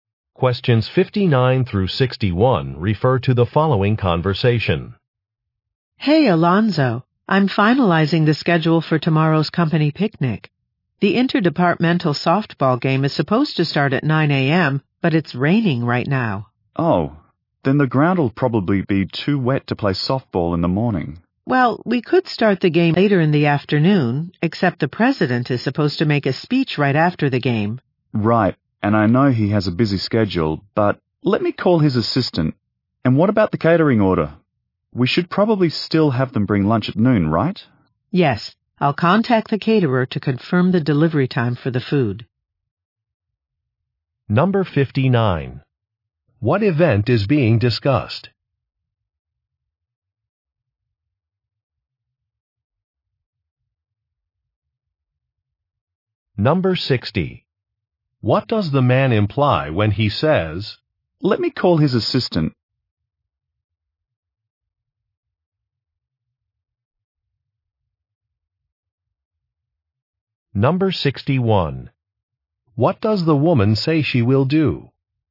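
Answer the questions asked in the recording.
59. A company picnic
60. He will check if the president's schedule can change
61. Contact the caterer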